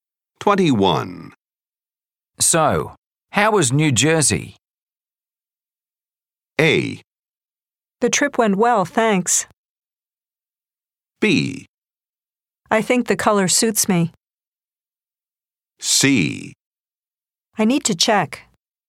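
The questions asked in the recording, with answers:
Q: So, how was New Jersey?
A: A: The trip went well, thanks.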